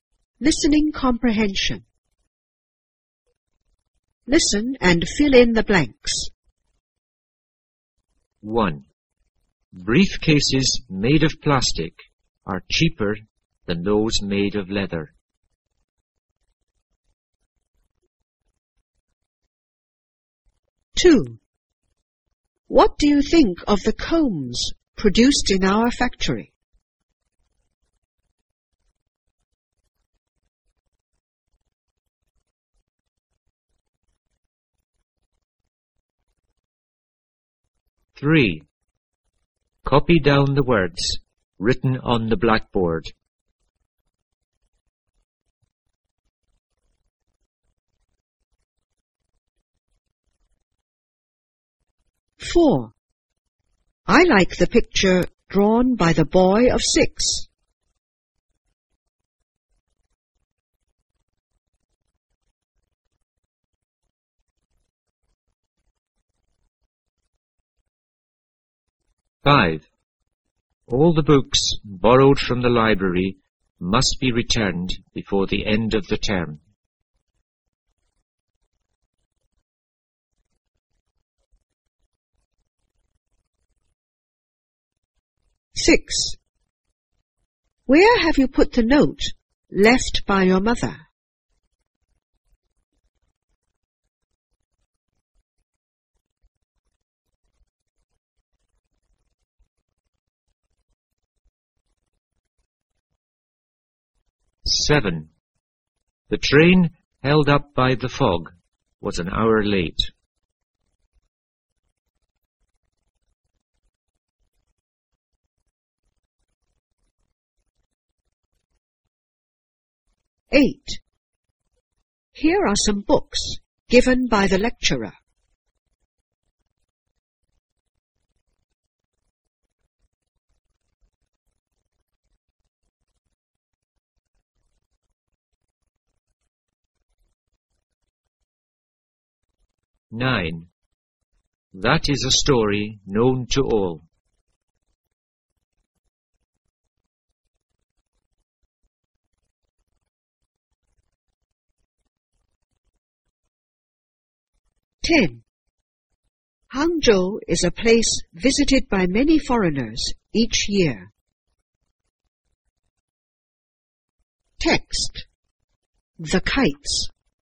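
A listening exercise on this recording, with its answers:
Listen and fill in the blanks.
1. Briefcases__are cheaper than those made of leather.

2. What do you think of the combs__.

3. Copy down the words__.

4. I like the picture__.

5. All the books must be returned before the end of the term.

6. Where have you put the note__?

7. The train__was an hour late.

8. Here are some books___.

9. That is a story___.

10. Hangzhou is a place___each year.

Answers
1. made of plastic
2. produced in our factory
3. written on the blackboard
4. drawn by the boy of 6
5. borrowed from the library
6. left by your mother
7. held up by the fog
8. given by the lecturer
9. known to all
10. visited by many foreigners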